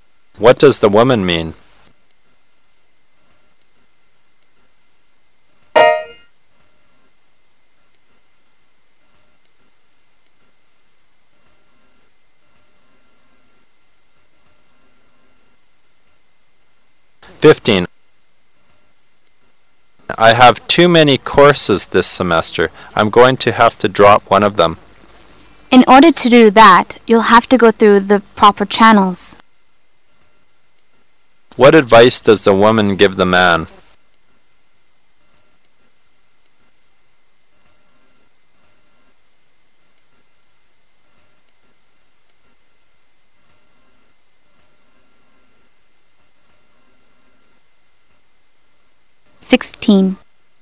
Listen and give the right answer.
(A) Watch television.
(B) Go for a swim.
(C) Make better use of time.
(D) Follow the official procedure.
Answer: (D) Follow the official procedure.

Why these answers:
同义转述。男士说想要停掉一门课,女士回应说,那一定要通过适当渠道,即要遵循正式的程序来办。"go through the proper channels"对应选项D)中的"follow the official procedure"的意思。

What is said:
[解析] M: I have too many courses this semester. I'm going to have to drop one of them. W: In order to do that, you'll have to go through the proper channels. Q: What advice does the woman give the man?